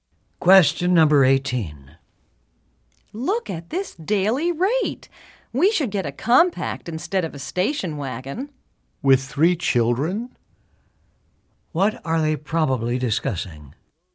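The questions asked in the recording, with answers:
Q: What are they probably discussing?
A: Renting a car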